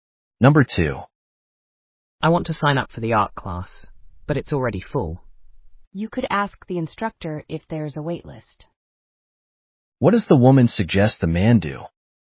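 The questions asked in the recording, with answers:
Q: What does the woman suggest the man do?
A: Ask the instructor if there's a waitlist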